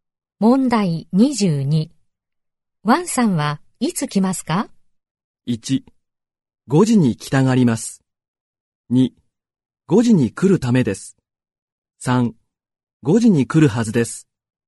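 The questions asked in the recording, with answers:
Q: ワンさんはいつ来ますか?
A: 3: 5時に来るはずです。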